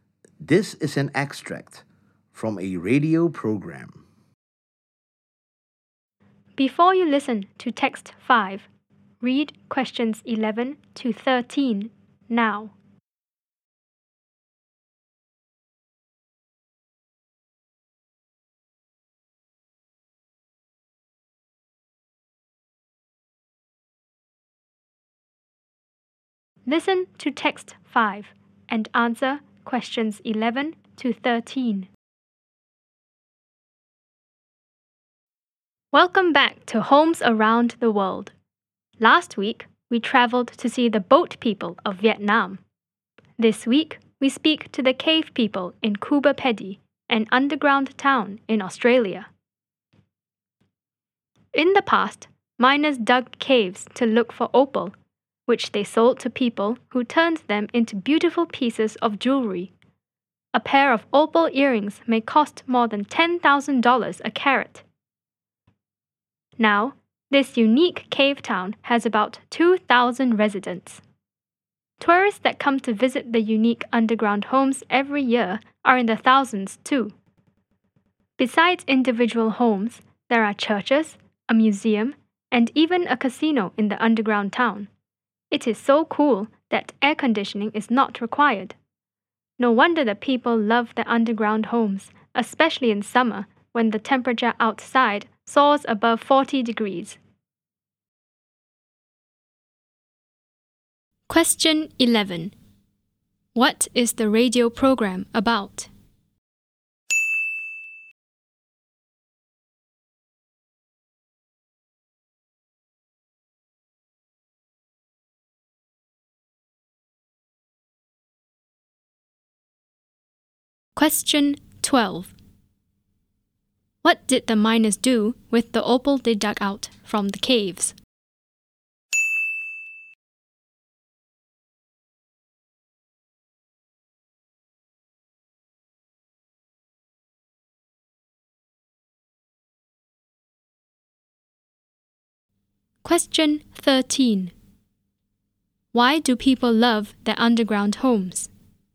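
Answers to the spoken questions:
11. Homes around the world, this week the underground cave homes in Coober Pedy, Australia
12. They sold it to people who made it into jewelry
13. They are so cool that no air conditioning is needed, even in hot summers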